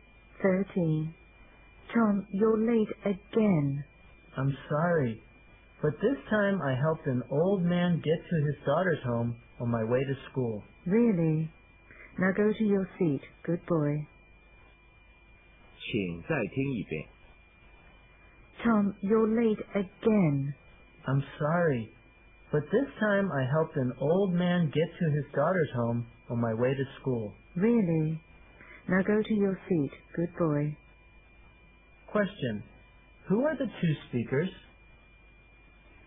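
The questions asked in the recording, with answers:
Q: Question. Who are the two speakers?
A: A teacher and a student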